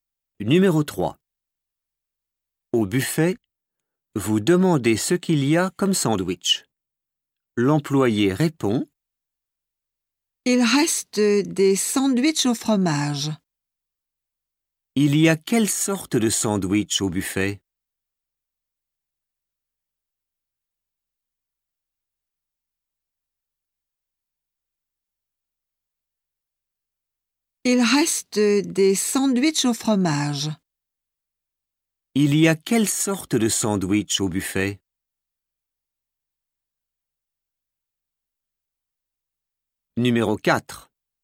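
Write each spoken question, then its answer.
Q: Il y a quelle sorte de sandwich au buffet?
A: Des sandwichs au fromage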